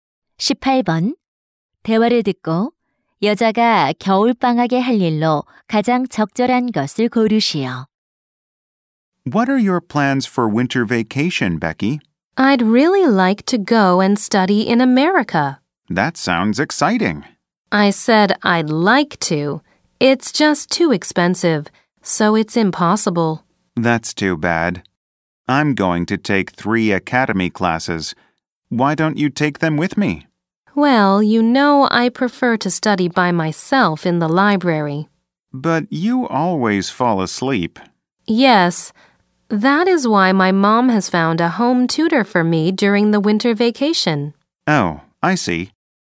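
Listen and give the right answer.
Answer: 가정교사와 공부하기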